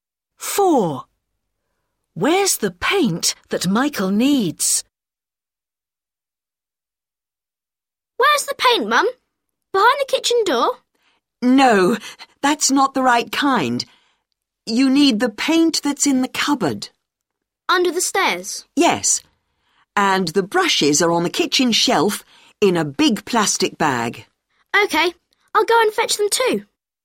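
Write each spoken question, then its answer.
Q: Where's the paint that Michael needs?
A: in the cupboard under the stairs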